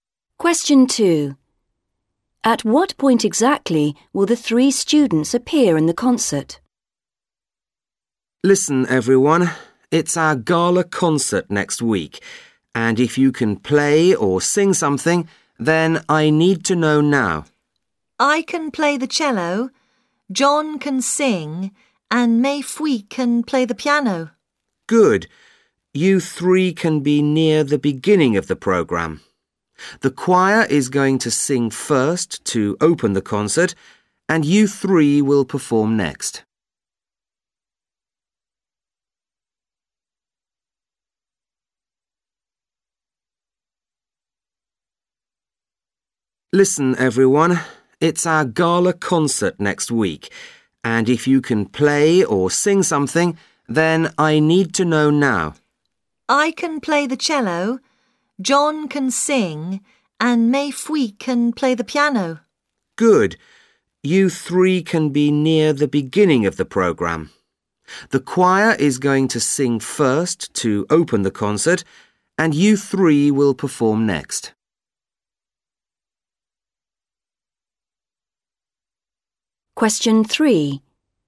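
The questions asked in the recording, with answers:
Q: At what point exactly will the three students appear in the concert?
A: Second, straight after the choir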